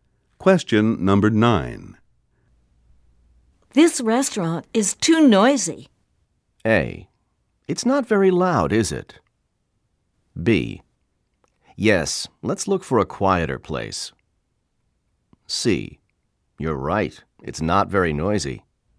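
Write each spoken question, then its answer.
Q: This restaurant is too noisy.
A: B: Yes, let's look for a quieter place.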